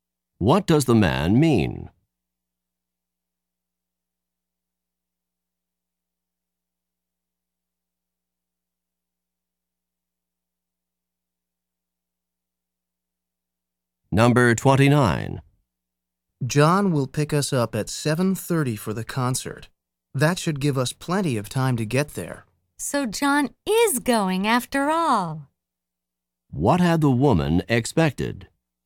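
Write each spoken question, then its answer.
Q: What had the woman expected?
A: That John would not go to the concert.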